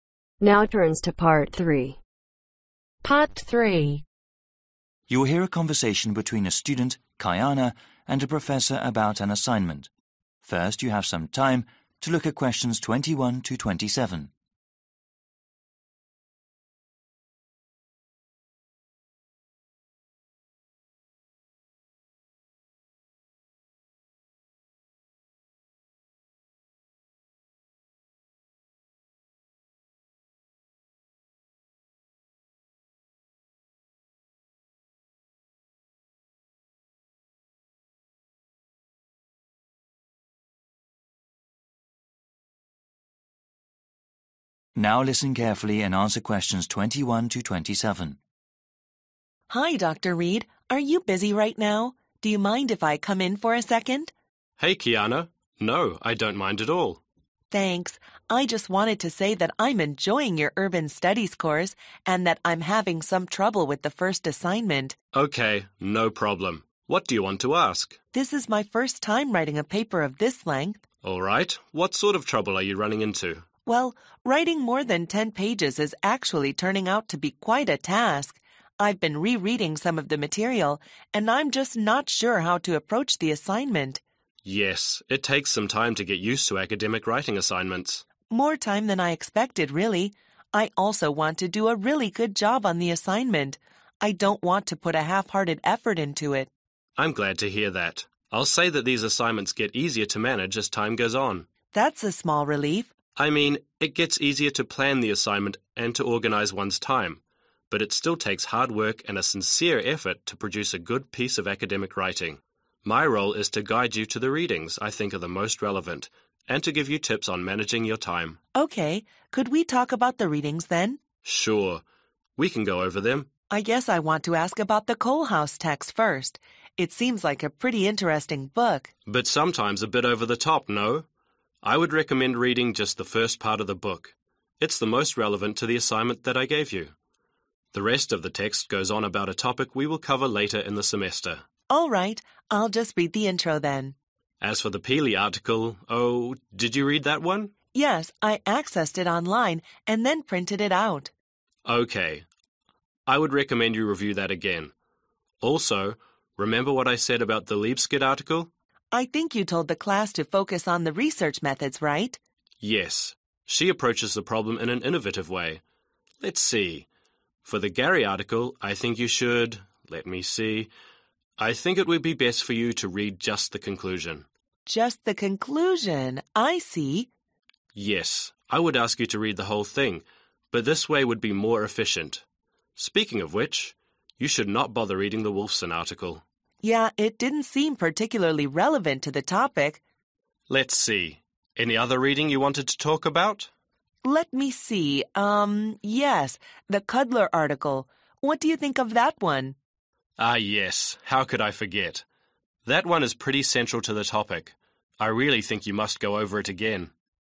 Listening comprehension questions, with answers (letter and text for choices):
Choose the correct letter A , B or C.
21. Kiana has been going over the reading for the assignment and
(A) is confident she can write the paper.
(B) is still wondering how to start the paper.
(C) is going to focus on another class.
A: (B) is still wondering how to start the paper.

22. According to the dialogue, one of Dr. Reade's role is to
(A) guide students to the most relevant readings.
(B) challenge students in every way possible.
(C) look for Potential doctoral candidates.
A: (A) guide students to the most relevant readings.

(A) Slightly useful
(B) Read it again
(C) Essential reading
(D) Read the first part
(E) Study research methods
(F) Don't even bother reading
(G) Read the conclusion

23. Kolehaus (23)............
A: (D) Read the first part

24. Pehlee (24)............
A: (B) Read it again

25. Lee skid (25)............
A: (E) Study research methods

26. Gary (26)............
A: (G) Read the conclusion

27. Wolf son (27)............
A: (F) Don't even bother reading